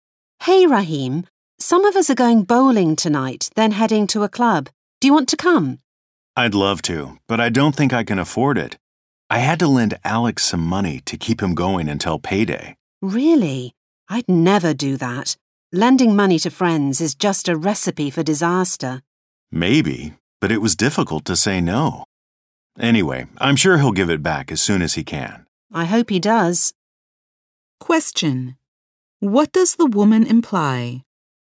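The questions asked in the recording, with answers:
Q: What does the woman imply?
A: It's a bad idea to lend money to friends, so Rahim may not get his money back.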